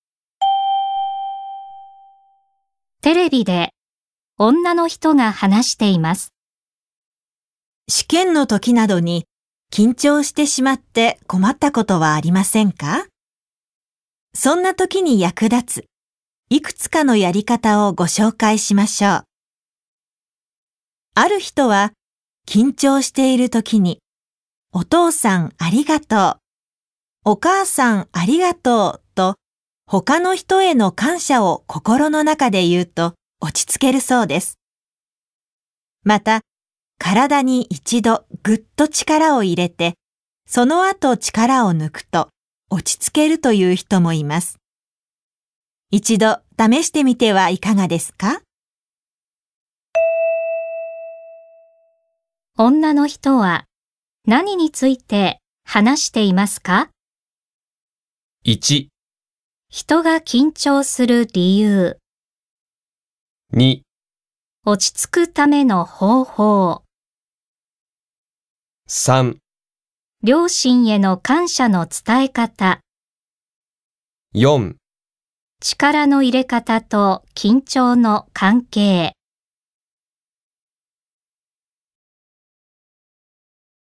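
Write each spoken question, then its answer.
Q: 女の人は何について話していますか?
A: 2: 落ち着くための方法。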